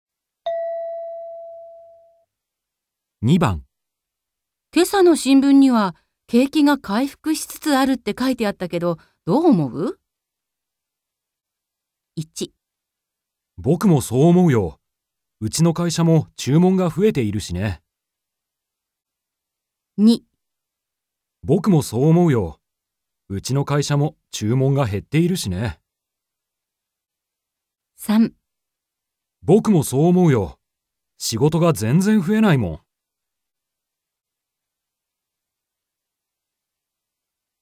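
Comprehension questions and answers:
今朝の新聞には景気が回復しつつあるって書いてあったけど、どう思う?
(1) 僕もそう思うよ。うちの会社も注文が増えているしね。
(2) 僕もそう思うよ。うちの会社も注文が減っているしね。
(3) 僕もそう思うよ。仕事が全然増えないもん。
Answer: 僕もそう思うよ。うちの会社も注文が増えているしね。

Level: N2

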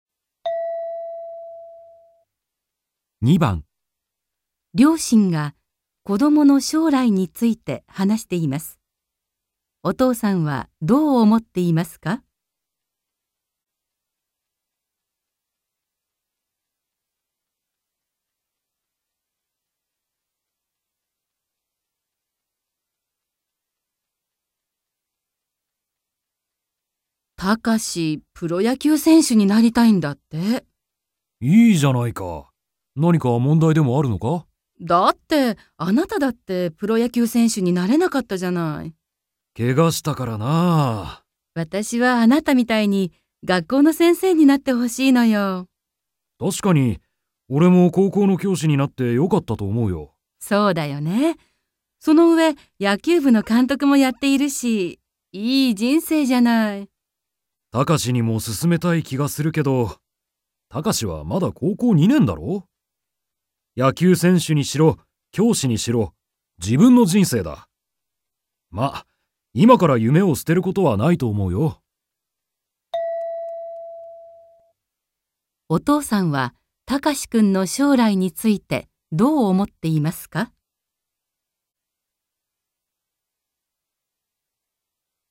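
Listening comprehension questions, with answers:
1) お父さんは隆君の将来についてどう思っていますか。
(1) 高校の先生になってほしいと思っている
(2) 自分で決めてほしいと思っている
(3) 野球部やきゅうぶ監督かんとくになってほしいと思っている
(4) プロ野球やきゅう選手せんしゅになるのに反対はんたいしている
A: 自分で決めてほしいと思っている

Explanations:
野球選手にしろ、教師にしろ、自分の人生だ。まあ、今から夢を捨てることはないと思うよ。

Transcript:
両親が子どもの将来について話しています。お父さんはどう思っていますか。
F: 隆、プロ野球選手になりたいんだって。
M: いいじゃないか。何か問題でもあるのか。
F: だって。あなただって、プロ野球選手になれなかったじゃない。
M: けがしたからなあ。
F: 私はあなたみたいに学校の先生になってほしいのよ。
M: 確かにおれも高校の教師になってよかったと思うよ。
F: そうだよね。その上、野球部の監督もやっているし・・・。いい人生じゃない。
M: 隣にもすすめたい気がするけど、隆はまだ高校2年だろ。
野球選手にしろ、教師にしろ、自分の人生だ。まあ、今から夢を捨てることはないと思うよ。

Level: N2

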